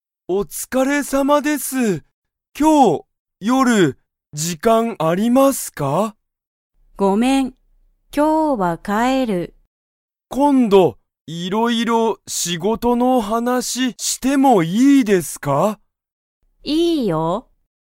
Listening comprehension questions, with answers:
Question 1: 田中(たなか)さんは、今日(きょう)の夜(よる)、時間(じかん)ありますか?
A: いいえ

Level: Level 1